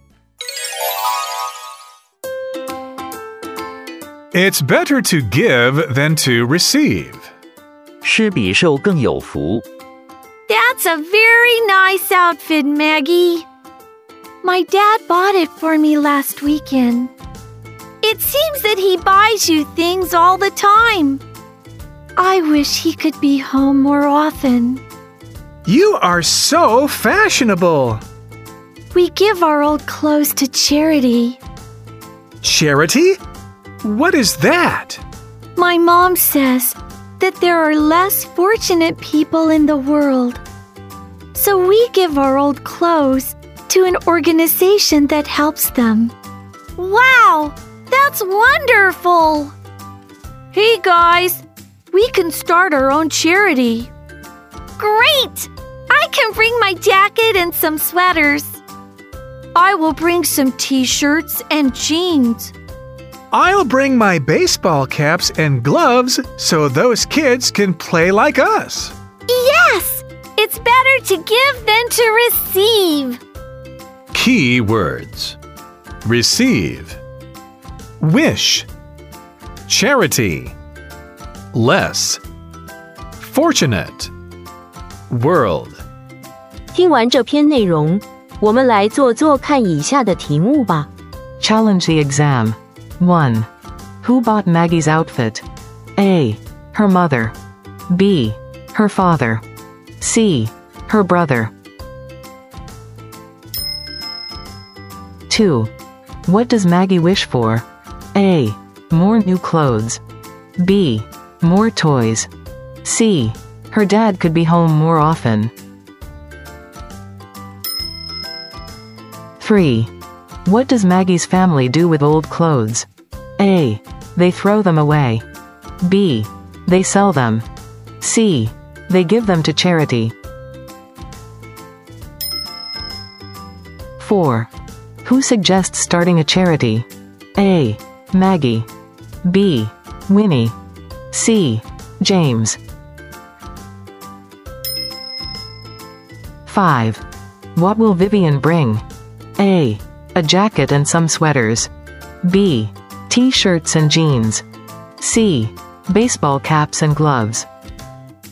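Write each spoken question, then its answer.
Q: Who bought Maggie's outfit?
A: B: Her father.

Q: What does Maggie wish for?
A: C: Her dad could be home more often.

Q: What does Maggie's family do with old clothes?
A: C: They give them to charity.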